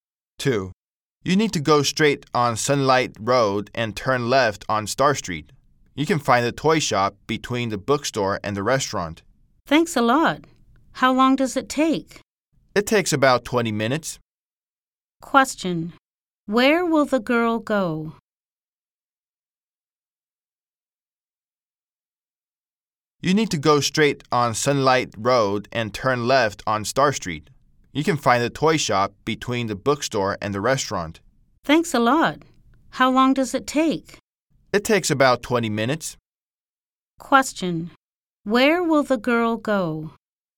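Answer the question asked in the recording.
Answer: The toy shop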